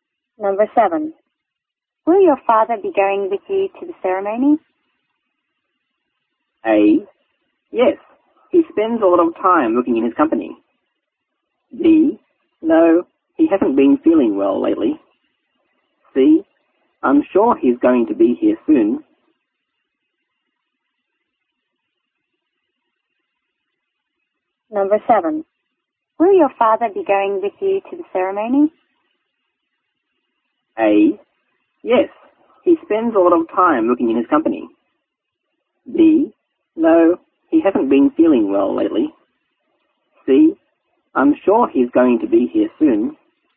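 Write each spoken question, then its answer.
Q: Will your father be going with you to the ceremony?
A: B: No. He hasn't been feeling well lately.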